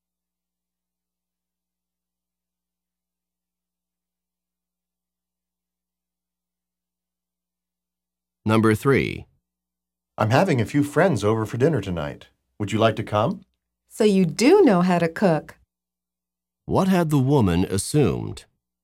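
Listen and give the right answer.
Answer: The man did not know how to cook.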